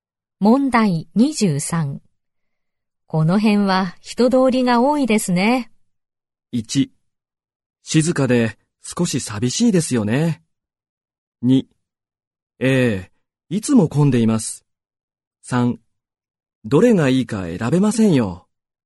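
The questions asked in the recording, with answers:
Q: この辺は人通りが多いですね。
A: 2: ええ、いつも混んでいます。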